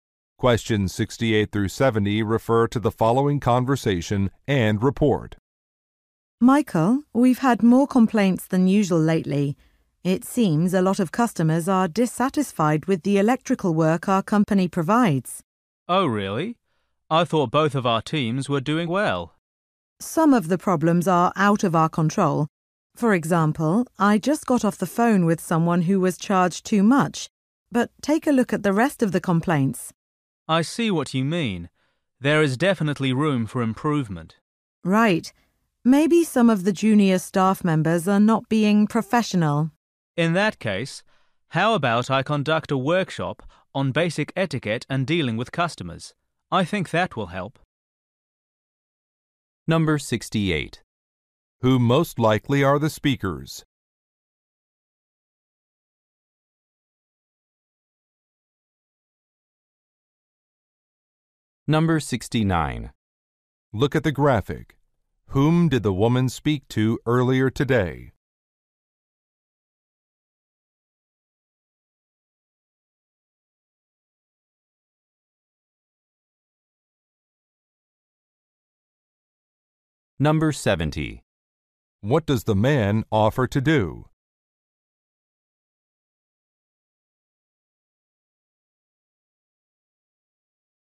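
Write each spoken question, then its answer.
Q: Who most likely are the speakers?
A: Employees of an electrical services company

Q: What does the man offer to do?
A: Run a workshop on etiquette and customer service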